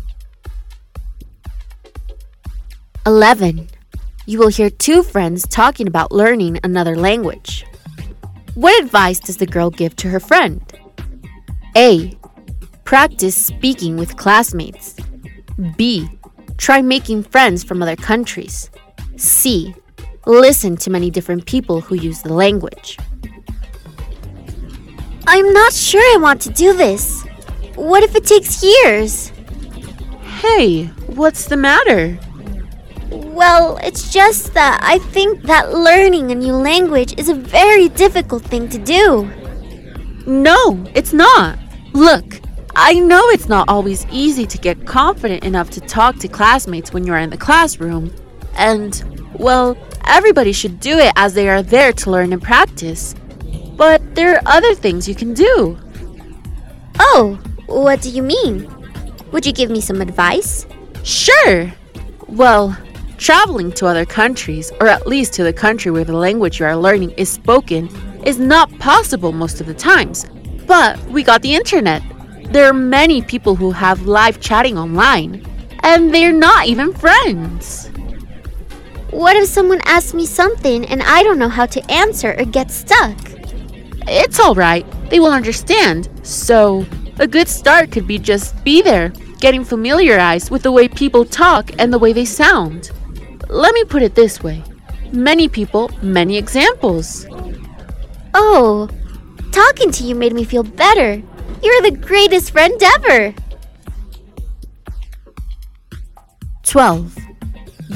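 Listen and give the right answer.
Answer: C: Listen to many different people who use the language.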